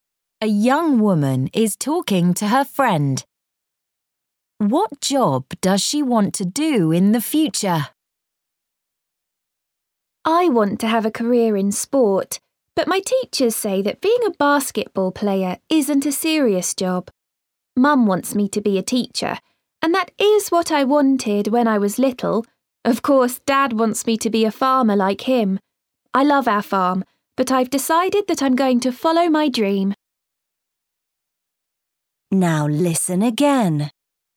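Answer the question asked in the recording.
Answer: Basketball player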